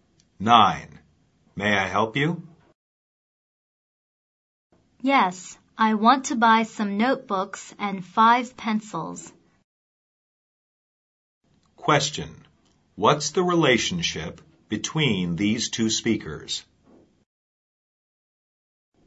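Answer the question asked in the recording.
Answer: Shop assistant and customer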